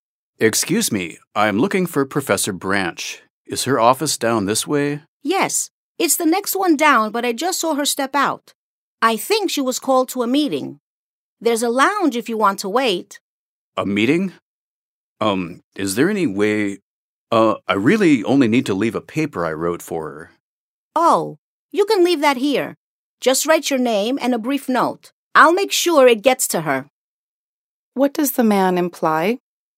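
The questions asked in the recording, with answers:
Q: What does the man imply?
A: The woman can leave her paper with him, and he will make sure Professor Branch gets it.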